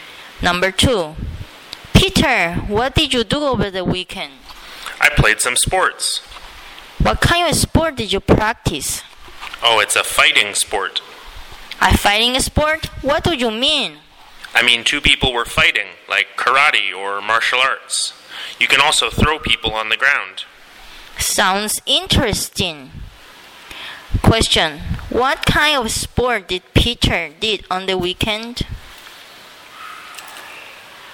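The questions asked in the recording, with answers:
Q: Question, what kind of sport did Peter did on the weekend?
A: A fighting sport, like karate or martial arts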